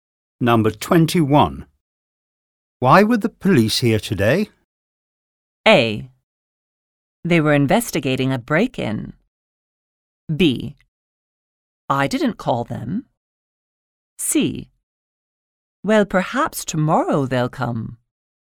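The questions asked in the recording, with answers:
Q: Why were the police here today?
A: A: They were investigating a break-in.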